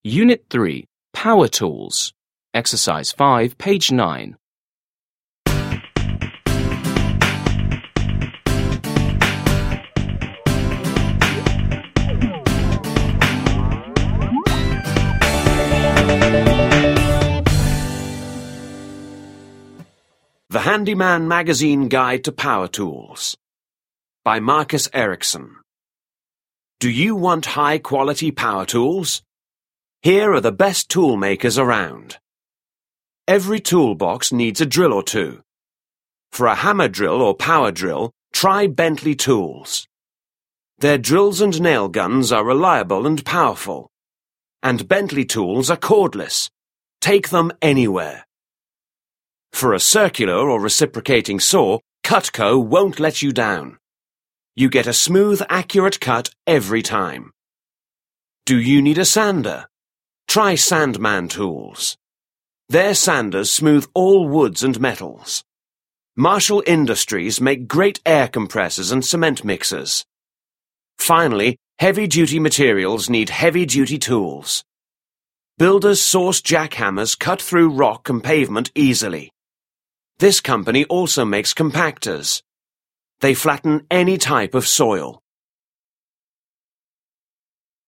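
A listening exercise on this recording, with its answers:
5. Listen and read the article from Handy Man magazine again. What are the benefits of a Bentley Tools power drill?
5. What are the benefits of a Bentley Tools power drill?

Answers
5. They are reliable, powerful and cordless, so you can take them anywhere.

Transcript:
Unit 3. Power Tools 1.
The Handy Man Magazine Guide to Power Tools
Do you want high quality power tools? Here are the best toolmakers around.
Every toolbox needs a drill or two! For a hammer drill or power drill, try Bentley Tools. Their drills and nail guns are reliable and powerful. And Bentley tools are cordless. Take them anywhere!
For a circular or reciprocating saw. Cutco won't let you down. You get a smooth, accurate cut every time. Do you need a sander? Try Sandman Tools. Their sanders smooth all woods and metals.
Marshall Industries makes great air compressors and cement mixers.
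Finally, heavy-duty materials need heavy-duty tools. Builder's Source jackhammers cut through rock and pavement easily! This company also makes compactors. They flatten any type of soil.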